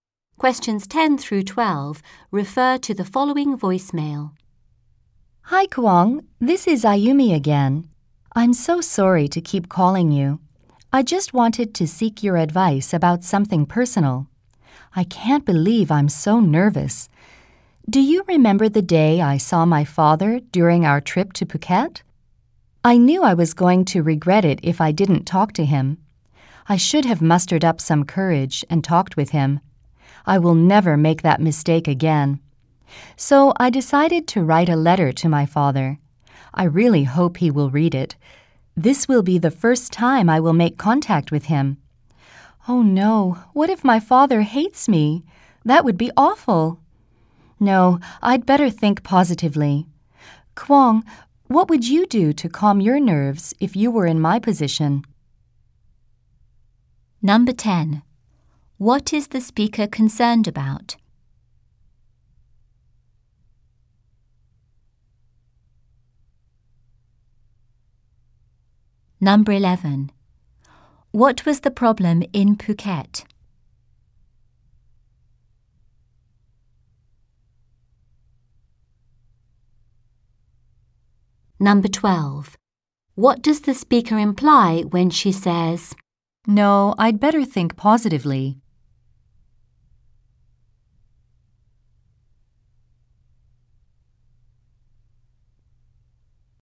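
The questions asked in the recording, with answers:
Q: What was the problem in Phuket?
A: She saw her father but didn't talk to him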